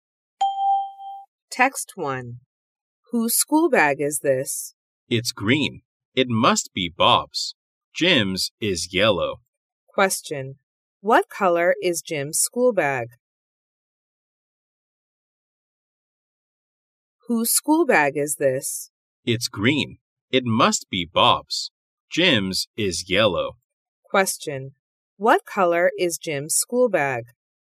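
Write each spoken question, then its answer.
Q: What color is Jim's school bag?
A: Yellow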